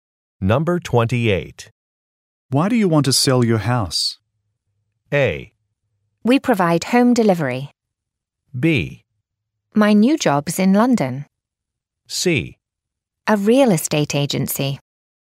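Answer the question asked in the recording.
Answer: B: My new job's in London.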